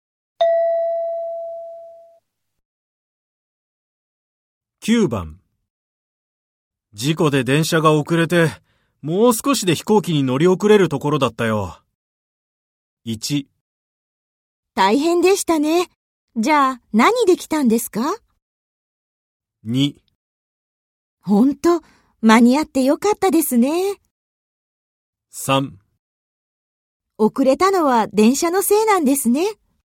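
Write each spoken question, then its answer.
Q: 事故で電車が遅れて、もう少しで飛行機に乗り遅れるところだったよ。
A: 2: 本当、間に合ってよかったですね。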